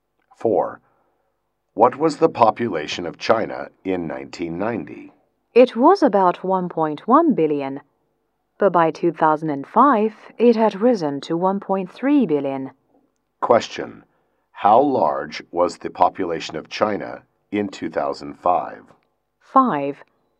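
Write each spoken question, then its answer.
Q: How large was the population of China in 2005?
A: About 1.3 billion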